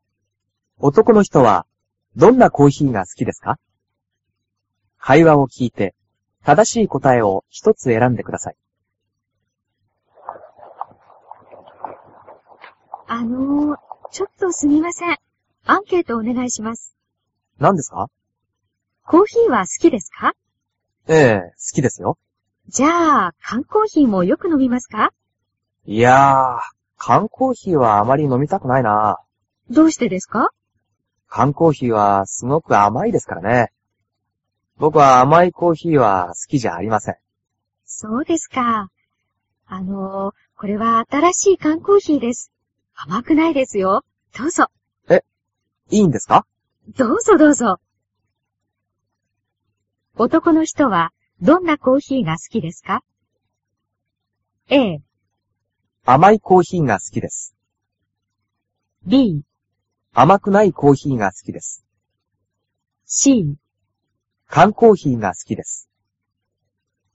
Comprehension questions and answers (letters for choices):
男の人はどんなコーヒーが好きですか。会話を聞いて正しい答えを一つ選んでください。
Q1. 男の人はどんなコーヒーが好きですか。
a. 甘いコーヒーが好きです。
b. 甘くないコーヒーが好きです。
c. 缶コーヒーが好きです。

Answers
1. b

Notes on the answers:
男:缶コーヒーはすごく甘いですからね。ぼくは、甘いコーヒーは、好きじゃありません。

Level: cơ bản